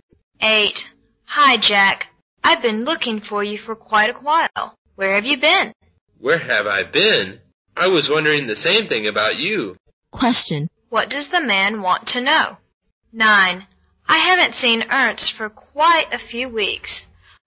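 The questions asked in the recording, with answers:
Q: What does the man want to know?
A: Where the woman has been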